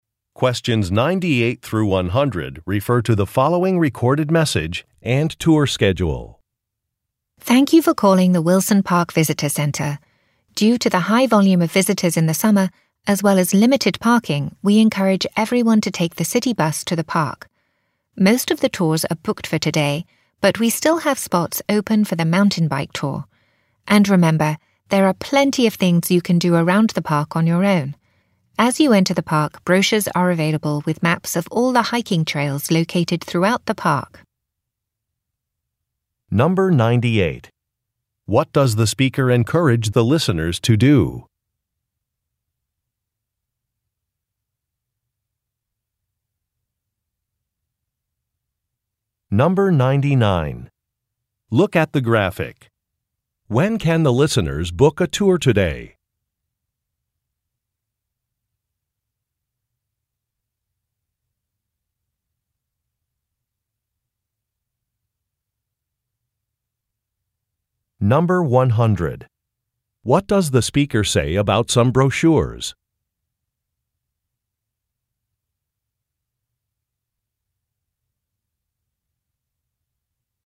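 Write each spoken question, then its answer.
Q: What does the speaker encourage the listeners to do?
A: Take the city bus to the park

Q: What does the speaker say about some brochures?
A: They are available at the park entrance and have maps of the hiking trails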